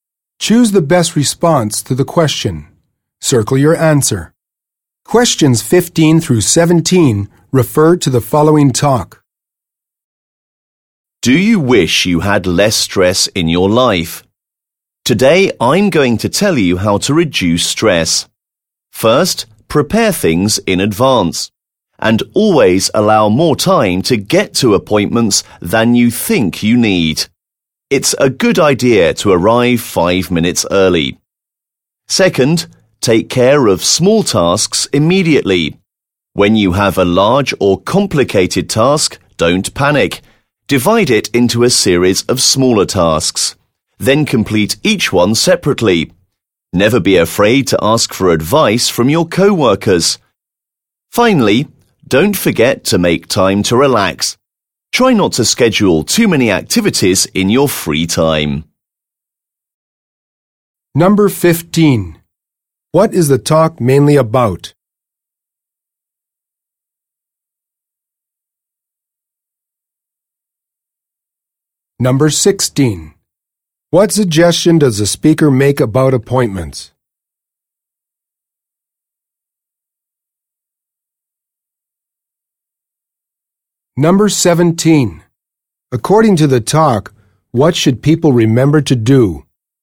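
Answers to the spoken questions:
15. How to reduce stress
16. Allow extra time and arrive 5 minutes early
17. Make time to relax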